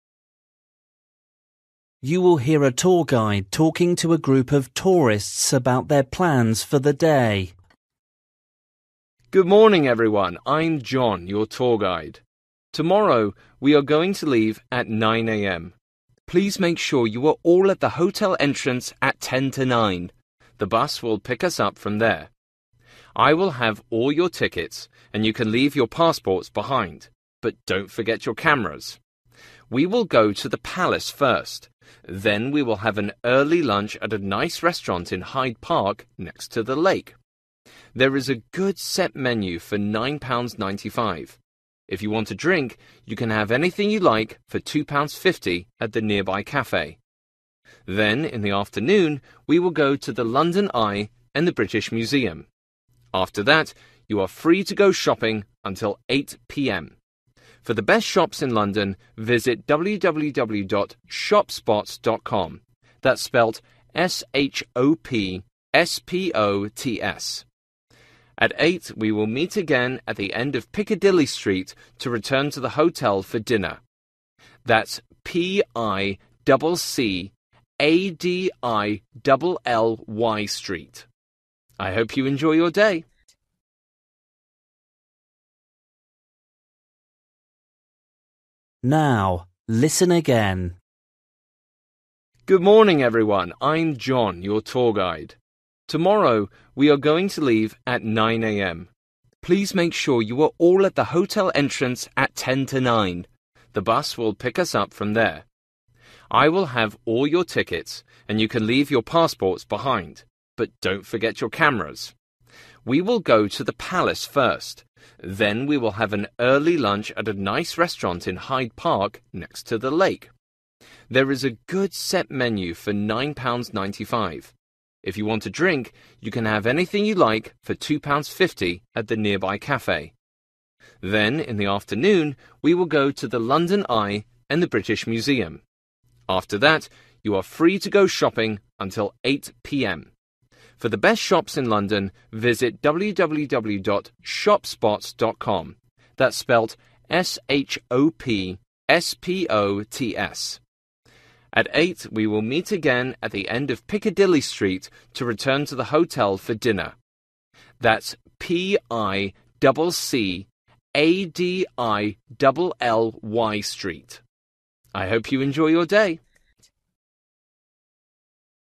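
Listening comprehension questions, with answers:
For each question, write the correct answer in the gap. Write one word or a number or a date or a time.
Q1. Meet at entrance: (1) a.m.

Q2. Bring: (2)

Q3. Cost of lunch: (3) £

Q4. More information on: www. (4) .com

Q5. Meet at the end of: (5) Street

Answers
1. 8:50
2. cameras
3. 9.95
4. shopspots
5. Piccadilly

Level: Luyện nghe trình độ A2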